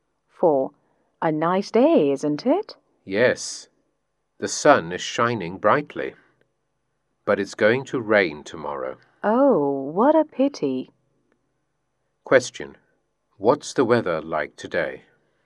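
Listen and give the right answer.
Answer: Sunny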